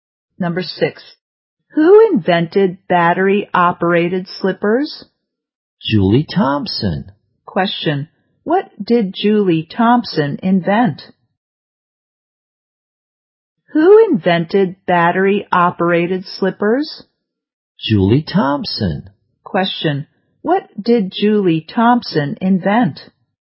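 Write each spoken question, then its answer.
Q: what did Julie Thompson invent?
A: Battery-operated slippers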